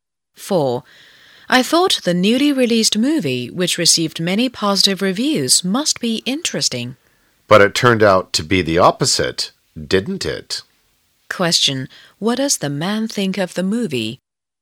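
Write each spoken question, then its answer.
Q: What does the man think of the movie?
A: It was disappointing, not interesting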